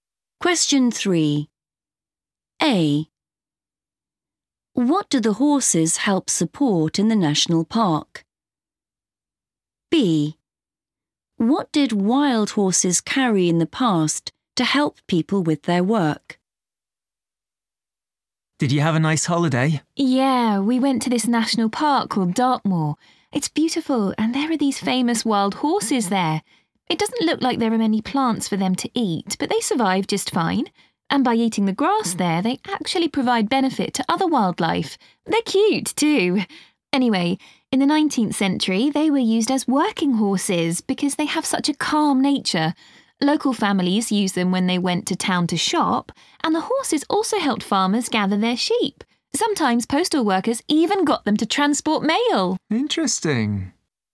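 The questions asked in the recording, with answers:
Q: What do the horses help support in the national park?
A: other wildlife

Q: What did wild horses carry in the past to help people with their work?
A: mail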